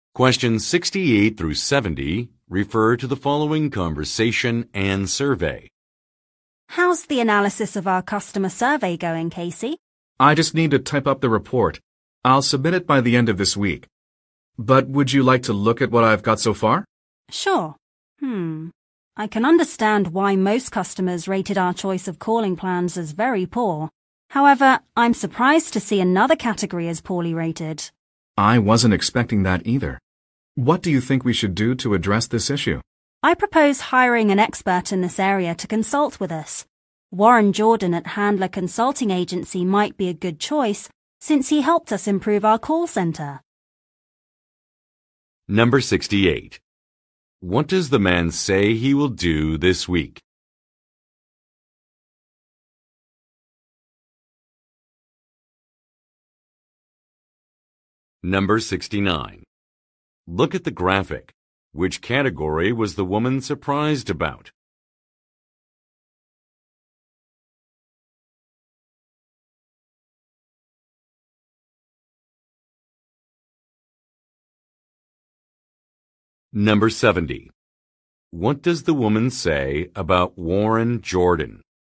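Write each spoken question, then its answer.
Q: What does the man say he will do this week?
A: Submit a report on the customer survey

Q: What does the woman say about Warren Jordan?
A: He helped improve their call center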